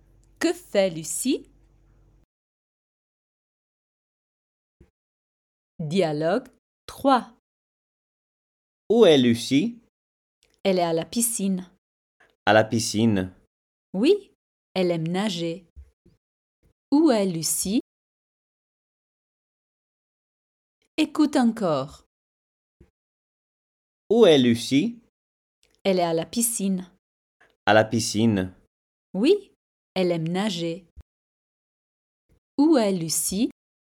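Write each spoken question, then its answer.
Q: Où est Lucie?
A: À la piscine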